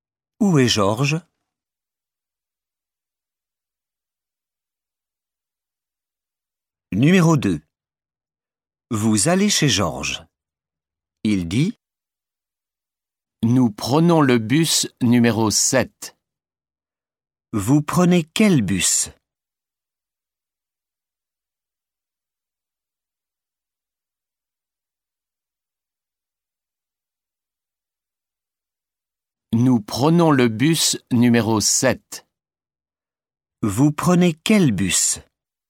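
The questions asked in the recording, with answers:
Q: Vous prenez quel bus?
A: le bus numéro 7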